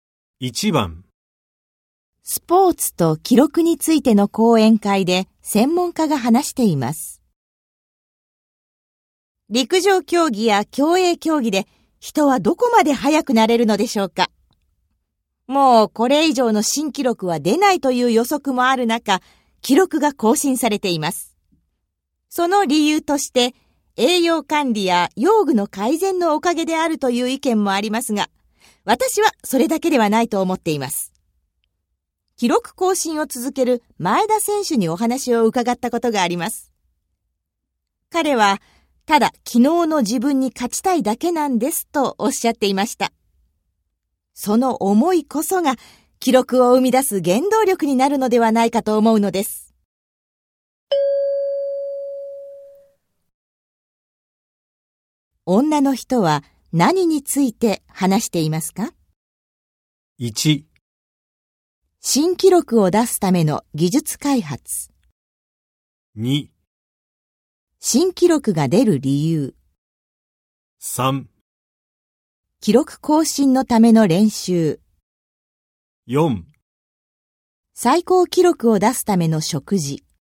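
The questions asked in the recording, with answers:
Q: 女の人は何について話していますか?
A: 2: 新記録が出る理由。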